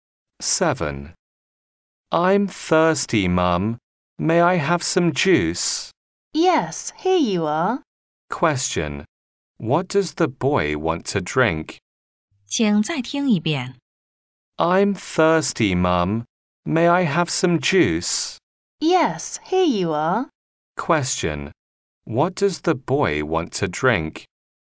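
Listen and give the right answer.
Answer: Juice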